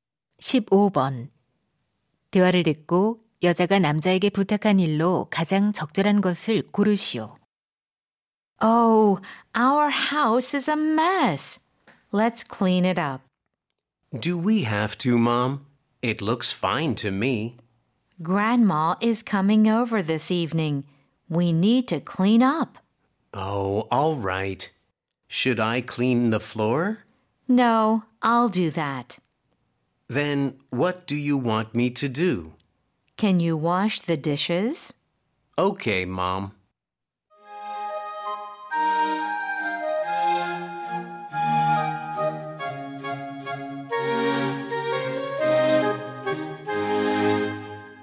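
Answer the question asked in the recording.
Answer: 설거지하기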